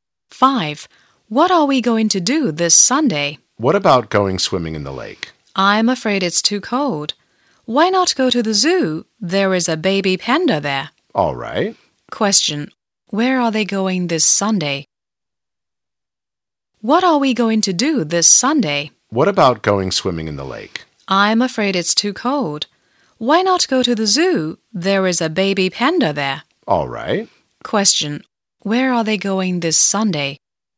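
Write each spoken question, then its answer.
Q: Where are they going this Sunday?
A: To the zoo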